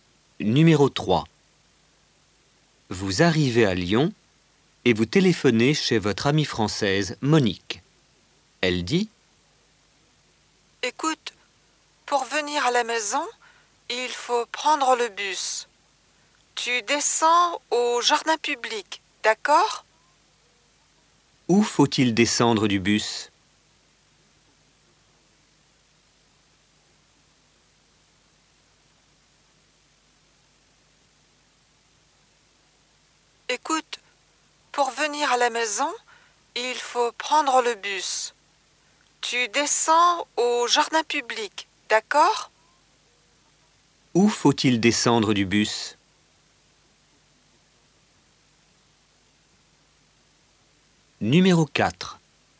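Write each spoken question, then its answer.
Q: Où faut-il descendre du bus?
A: Au jardin public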